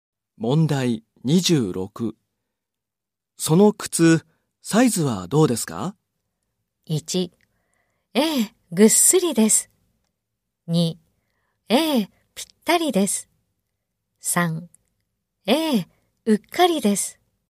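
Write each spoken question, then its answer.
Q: その靴、サイズはどうですか?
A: 2: ええ、ぴったりです。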